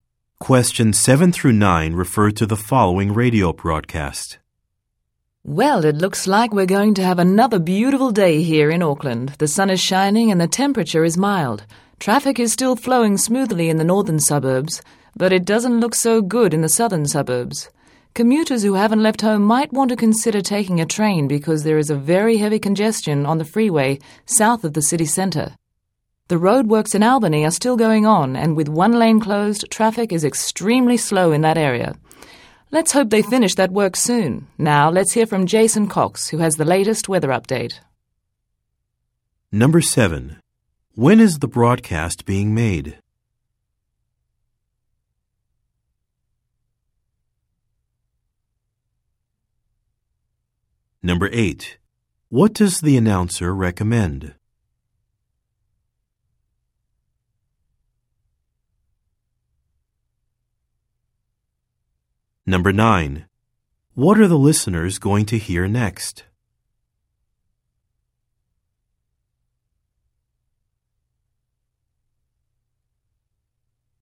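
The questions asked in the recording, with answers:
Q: What does the announcer recommend?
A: Taking a train

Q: What are the listeners going to hear next?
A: A weather update from Jason Cox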